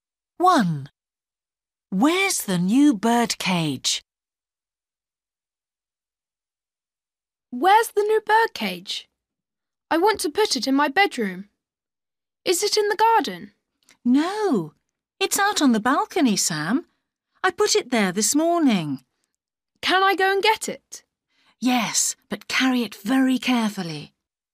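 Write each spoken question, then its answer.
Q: Where's the new birdcage?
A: On the balcony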